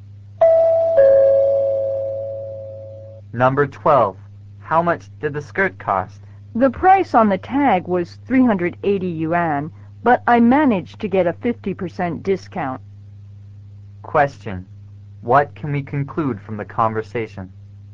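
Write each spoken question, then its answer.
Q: What can we conclude from the conversation?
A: The skirt cost 190 yuan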